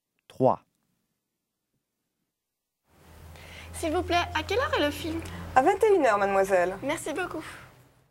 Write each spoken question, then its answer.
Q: S'il vous plaît, à quelle heure est le film?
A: number 3, 2100